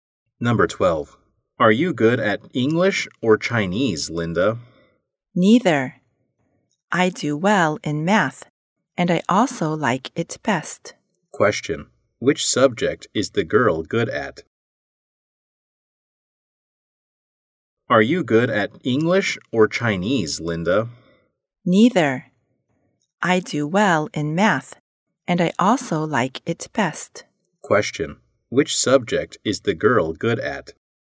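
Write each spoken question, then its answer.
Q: Which subject is the girl good at?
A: Math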